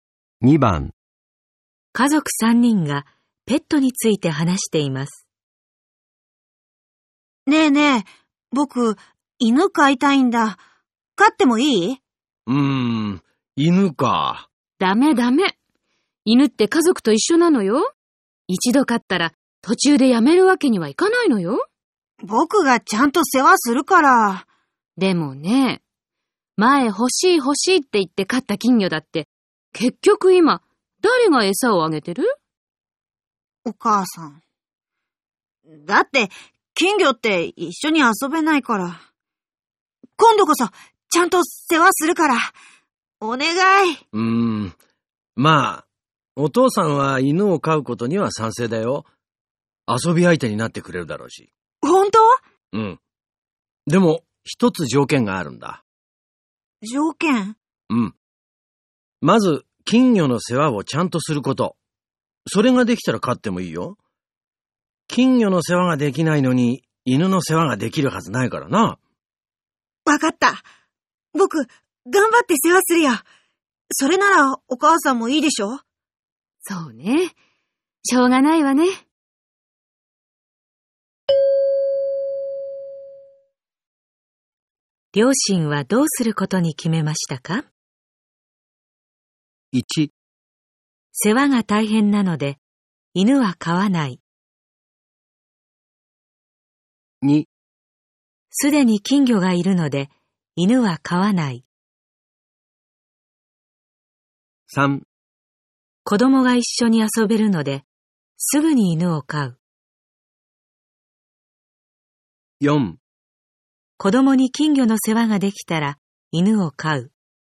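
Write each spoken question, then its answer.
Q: 両親はどうすることに決めましたか?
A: 4: 子供に金魚の世話ができたら、犬を飼う。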